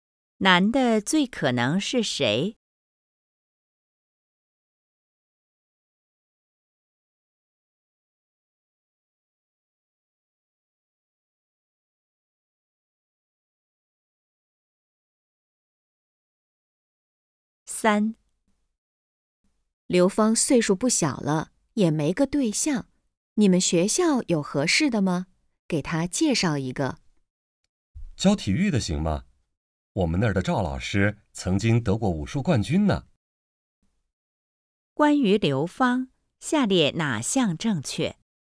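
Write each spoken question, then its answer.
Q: 关于刘芳,下列哪项正确?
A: 岁数不小了,还没有对象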